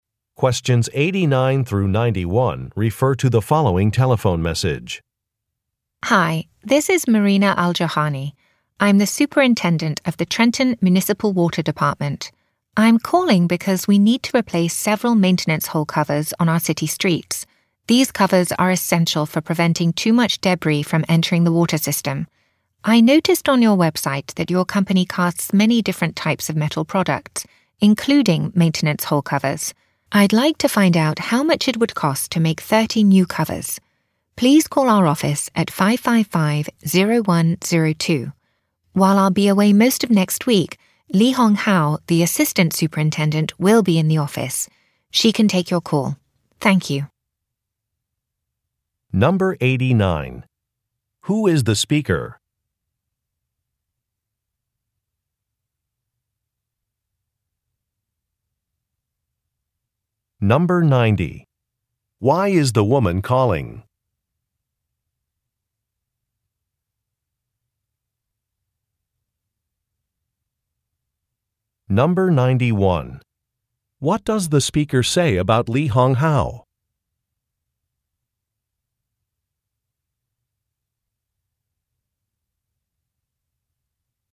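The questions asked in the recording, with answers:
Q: Who is the speaker?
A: A water department superintendent

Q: Why is the woman calling?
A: To ask the cost of making 30 maintenance hole covers

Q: What does the speaker say about Li Hong Hao?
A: She will be in the office next week and can take the call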